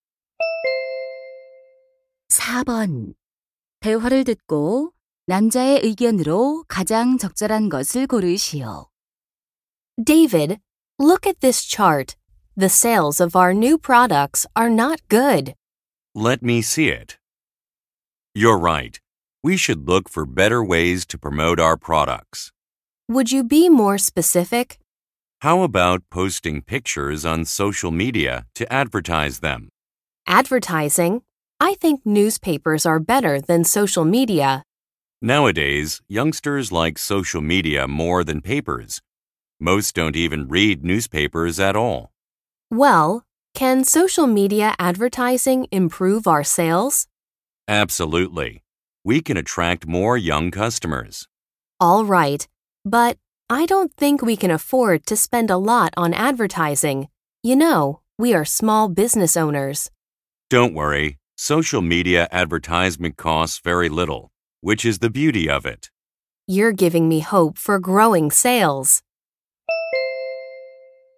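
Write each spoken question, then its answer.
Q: 대화를 듣고 남자의 의견으로 가장 적절한 것을 고르시오.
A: 소셜 미디어 광고가 저렴하고 판매 증진에 효과적이다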